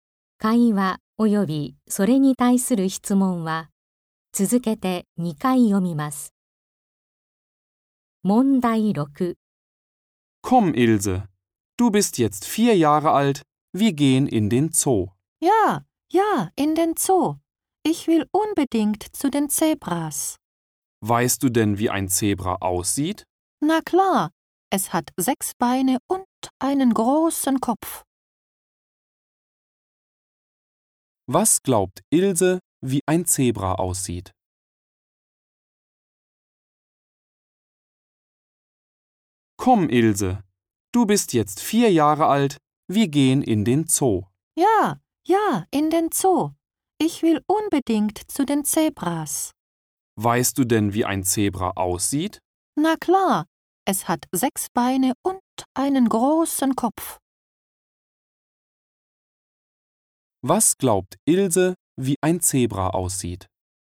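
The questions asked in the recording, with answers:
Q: Was glaubt Ilse, wie ein Zebra aussieht?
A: Es hat 6 Beine und einen großen Kopf.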